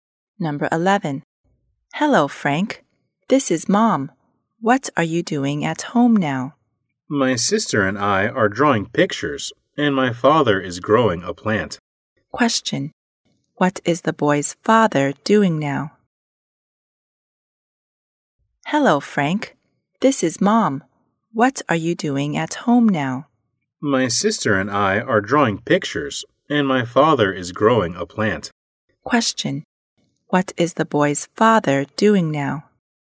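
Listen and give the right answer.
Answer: Growing a plant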